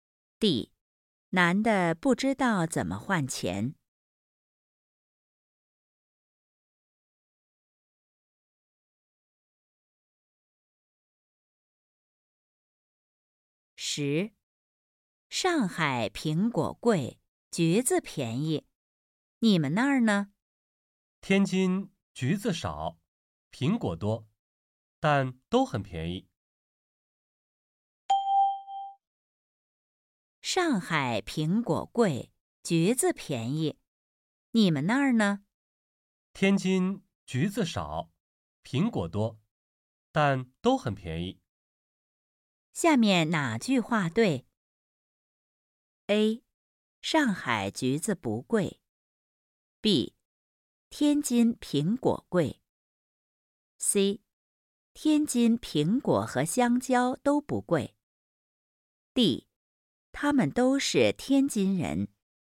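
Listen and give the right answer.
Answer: A: 上海橘子不贵。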